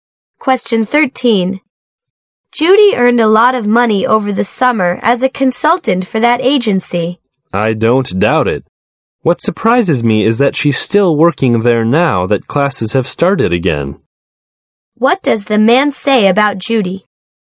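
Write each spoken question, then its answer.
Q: What does the man say about Judy?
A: He is surprised she's still working there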